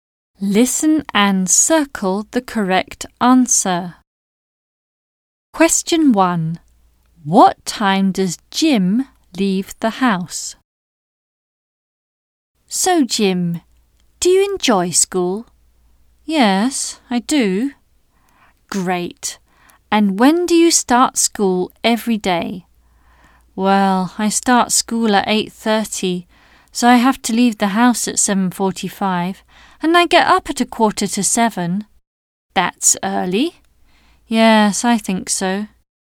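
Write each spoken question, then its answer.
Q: What time does Jim leave the house?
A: 7:45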